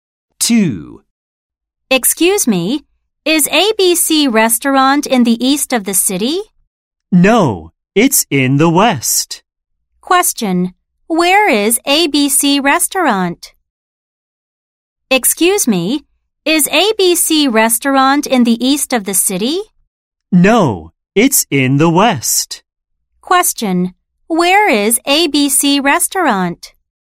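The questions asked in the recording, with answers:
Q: Question, where is ABC Restaurant?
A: In the west of the city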